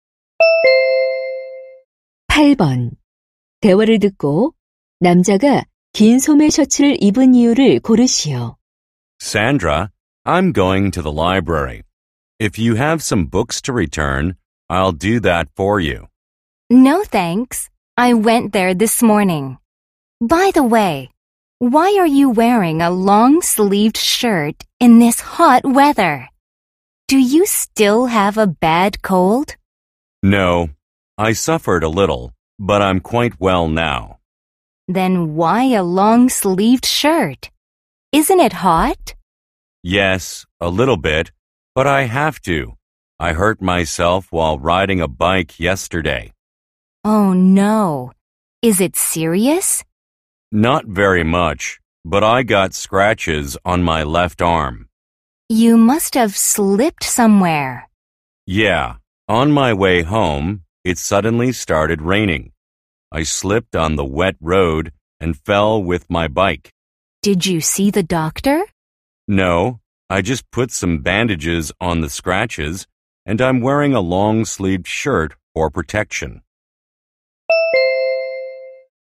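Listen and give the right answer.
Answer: 자전거를 타다 넘어져 팔에 긁힌 상처를 보호하려고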